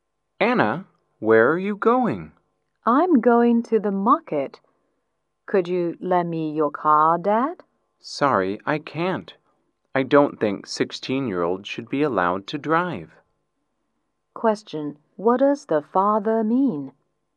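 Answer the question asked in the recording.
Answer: Anna is too young to drive, so he won't lend her the car.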